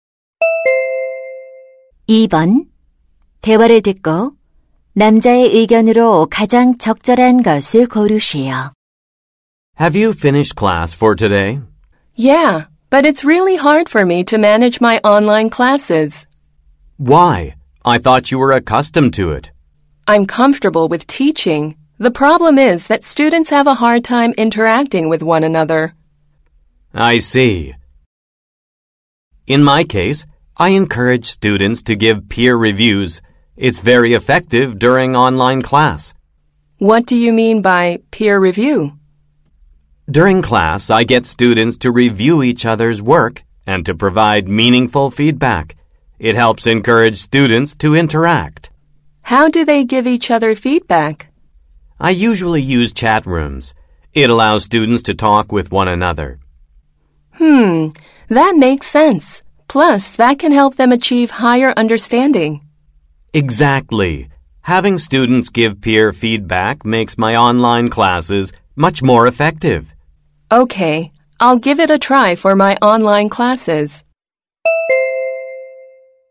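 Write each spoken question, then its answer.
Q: 대화를 듣고 남자의 의견으로 가장 적절한 것을 고르시오.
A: 온라인 수업에서 학생 간 동료 피드백이 효과적이다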